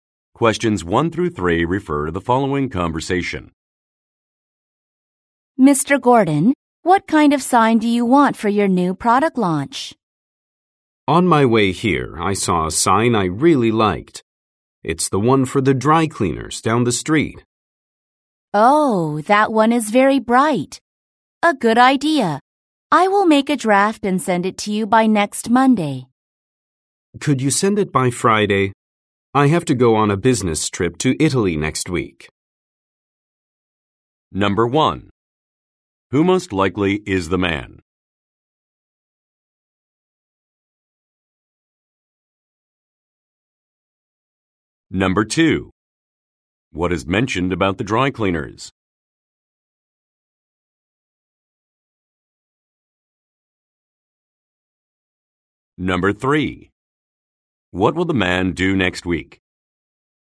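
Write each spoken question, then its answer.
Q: What is mentioned about the dry cleaners?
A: Its sign is very bright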